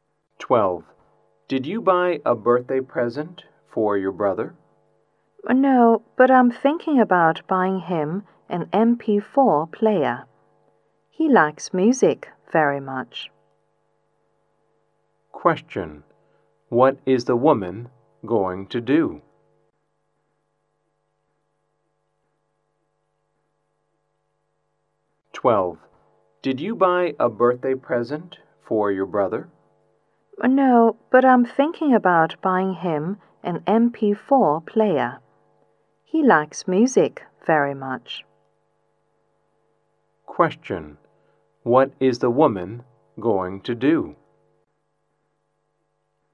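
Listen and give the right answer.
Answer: Buy an MP4 player for her brother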